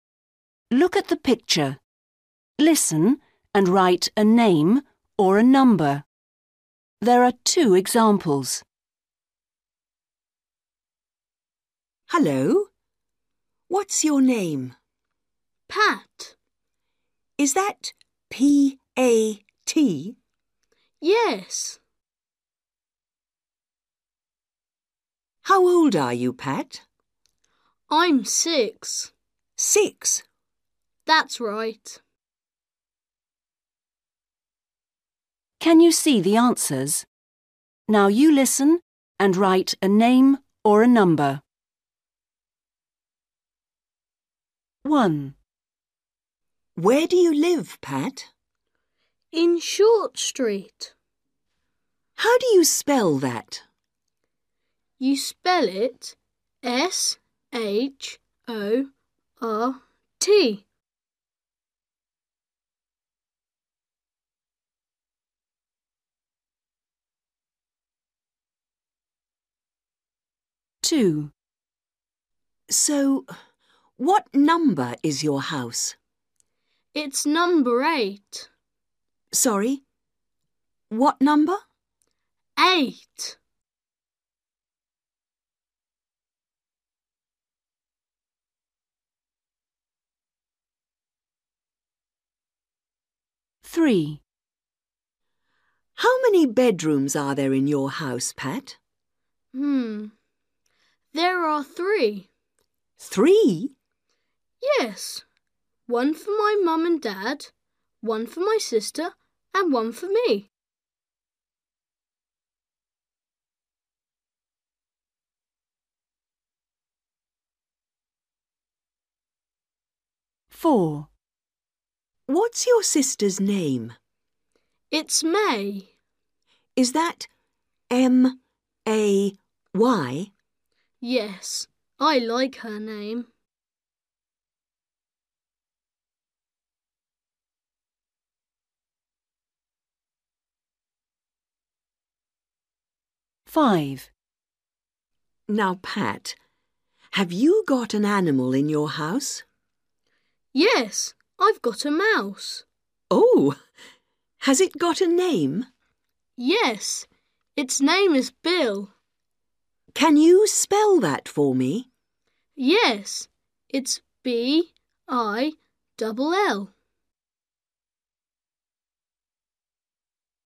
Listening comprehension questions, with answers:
Read the question. Listen and write a name or a number.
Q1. Where does Pat live? ........................... Street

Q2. What's the number of Pat's house? ...........................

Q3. How many bedrooms are there in Pat's house? ...........................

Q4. What's Pat's sister's name? ...........................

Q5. What's the name of Pat's mouse? ...........................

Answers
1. Short
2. 8/eight
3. 3/three
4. May
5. Bill

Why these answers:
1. WOMAN: Where do you live, Pat? BOY: In Short Street. WOMAN: How do you spell that? BOY: You spell it S-H-O-R-T.
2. WOMAN: So, what number is your house? BOY: It's number eight. WOMAN: Sorry ... what number? BOY: Eight.
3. WOMAN: How many bedrooms are there in your house, Pat? BOY: Mmm. There are three. WOMAN: Three? BOY: Yes. One for my mum and dad, one for my sister and one for me.
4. WOMAN: What's your sister's name? BOY: It's May. WOMAN: Is that M-A-Y? BOY: Yes. I like her name.
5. WOMAN: Now, Pat, have you got an animal in your house? BOY: Yes, I've got a mouse. WOMAN: Oh. Has it got a name? BOY: Yes. Its name is Bill. WOMAN: Can you spell that for me? BOY: Yes. Its B-I- double L.

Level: Starters